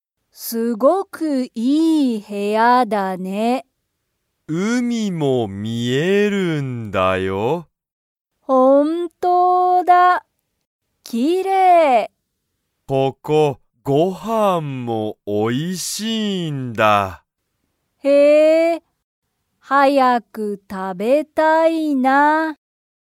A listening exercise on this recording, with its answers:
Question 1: 部屋(へや)から____が見(み)える。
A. ごはん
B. 車(くるま)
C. 海(うみ)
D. 映画(えいが)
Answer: 海(うみ)

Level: Level 1

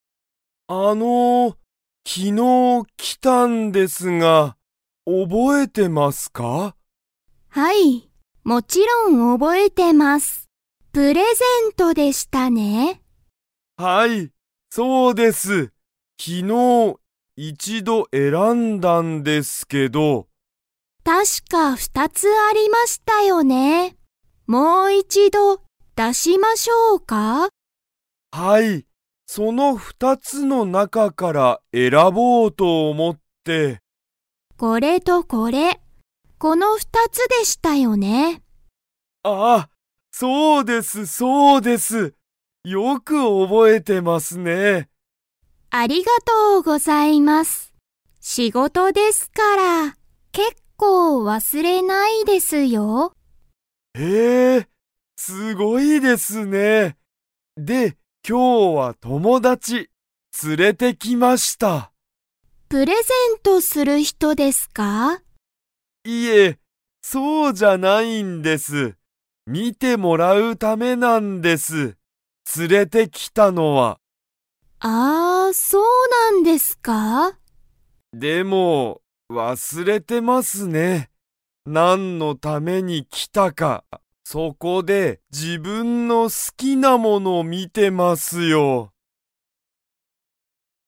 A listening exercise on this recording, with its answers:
ユタカはその____の中(なか)から選(えら)ぼうと思(おも)っている。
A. 一(ひと)つ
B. 二(ふた)つ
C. 三(みっ)つ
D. 四(よっ)つ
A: 二(ふた)つ

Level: Level 2

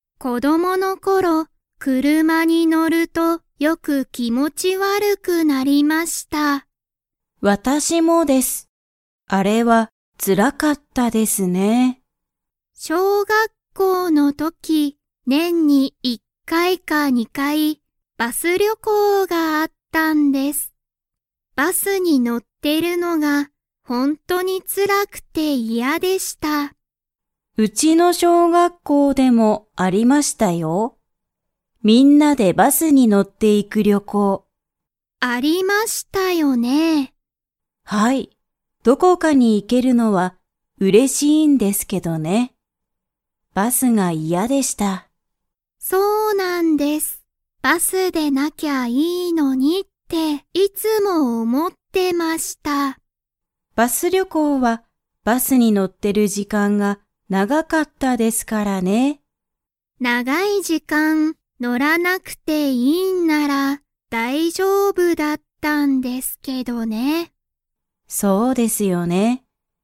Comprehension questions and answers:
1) 小学校しょうがっこうの時とき、何なにに乗のって行いく旅行りょこうがありましたか?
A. 電車でんしゃ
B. 車くるま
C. 自転車じてんしゃ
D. バス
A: バス

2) 二人ふたりは、 バスに乗のると、気持きもち悪わるくなった。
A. 長ながい時間じかん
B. ちょっとの時間じかん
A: 長ながい時間じかん

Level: Level 3

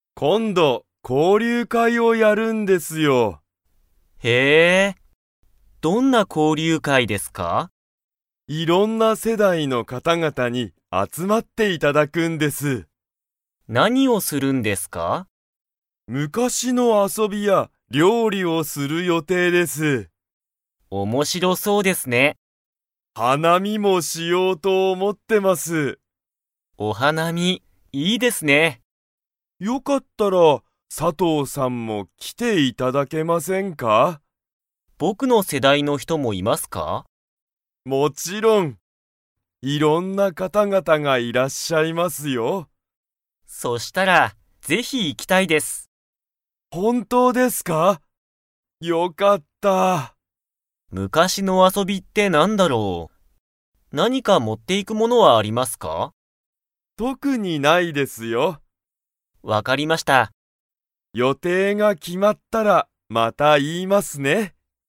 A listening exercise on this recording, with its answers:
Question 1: 交流会こうりゅうかいには、いろんな の方ほうが集あつまる。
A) 遊あそび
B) 料理りょうり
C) 世代せだい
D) 昔むかし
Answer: 世代せだい

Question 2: 交流会こうりゅうかいには、佐藤さとうさんの世代せだいの人ひともいますか?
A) はい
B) いいえ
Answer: はい

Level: Level 4

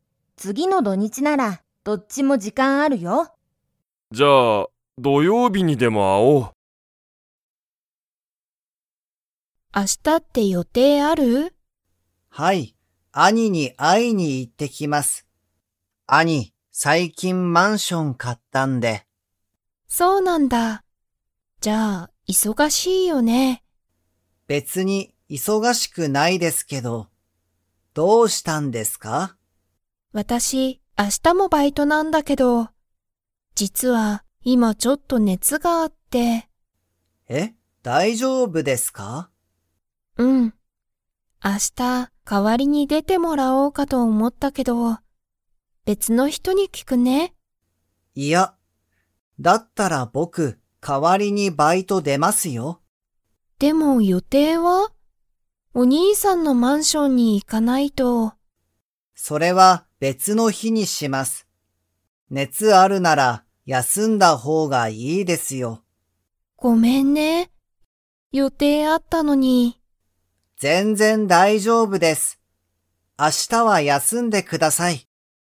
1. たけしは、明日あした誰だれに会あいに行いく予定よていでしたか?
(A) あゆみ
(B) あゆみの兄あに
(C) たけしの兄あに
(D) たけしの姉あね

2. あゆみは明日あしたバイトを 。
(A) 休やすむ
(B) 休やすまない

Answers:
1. たけしの兄あに
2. 休やすむ

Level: Level 4

